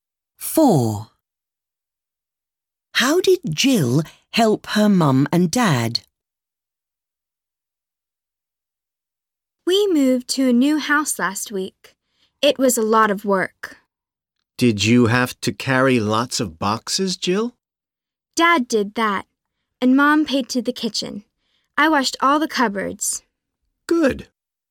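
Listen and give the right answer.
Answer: She washed all the cupboards.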